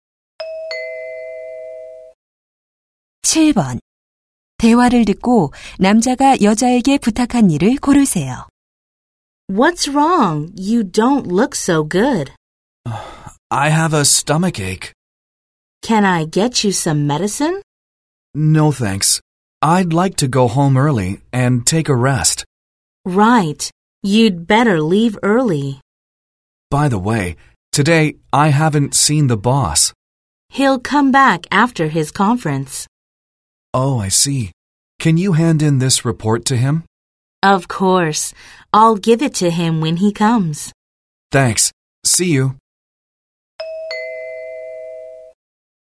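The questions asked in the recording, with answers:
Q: 대화를 듣고 남자가 여자에게 부탁한 일을 고르세요.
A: 상사에게 보고서 제출하기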